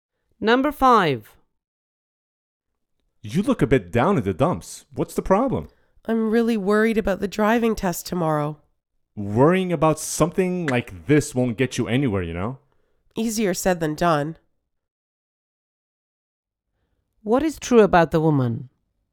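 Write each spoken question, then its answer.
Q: What is true about the woman?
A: She is worried about her driving test tomorrow.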